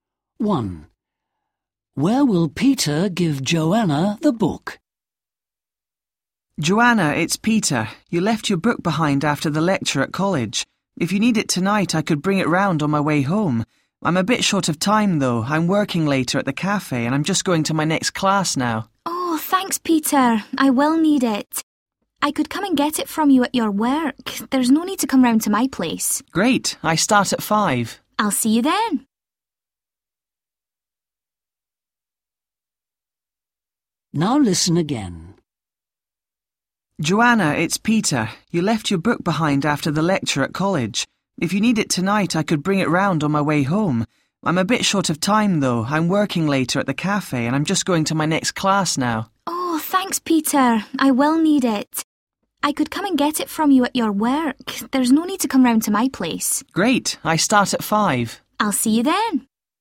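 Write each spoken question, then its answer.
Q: Where will Peter give Joanna the book?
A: At the cafe where he works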